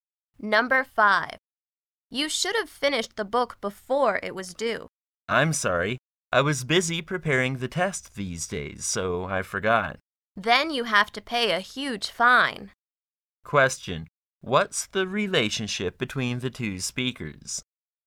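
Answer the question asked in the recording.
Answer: Librarian and student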